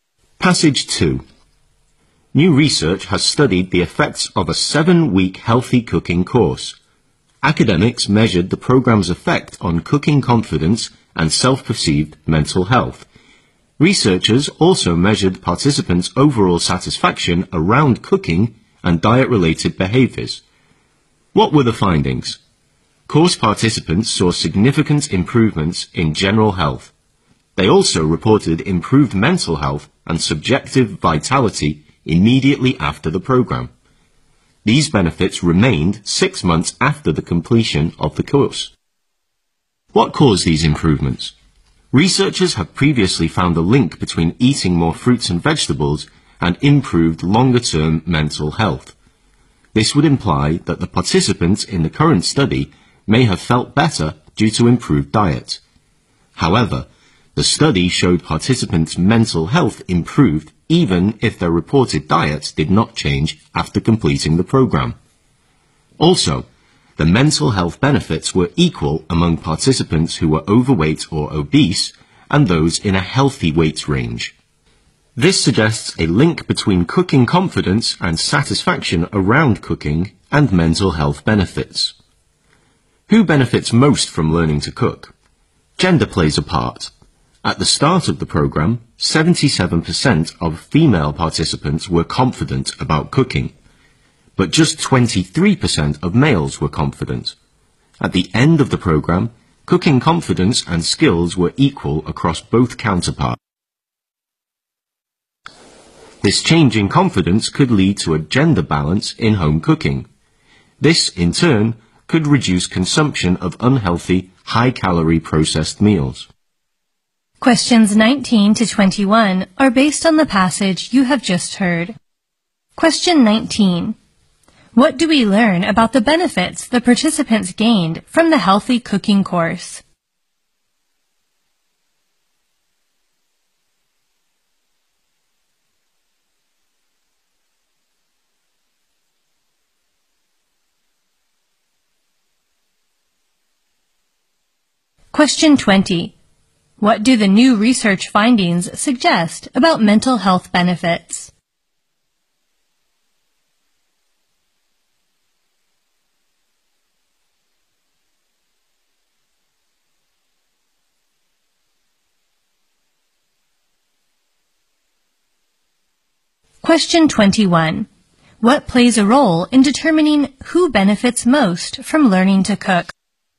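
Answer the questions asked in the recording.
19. Improved general and mental health, which remained six months after the course.
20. They are linked to cooking confidence and satisfaction around cooking.
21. Gender.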